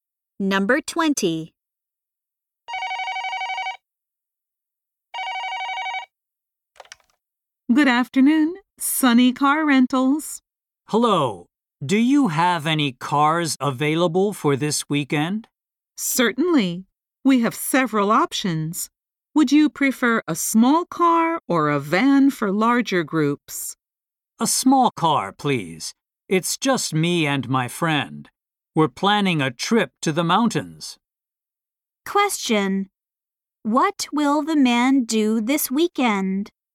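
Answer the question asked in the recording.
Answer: Go on a trip to the mountains with his friend.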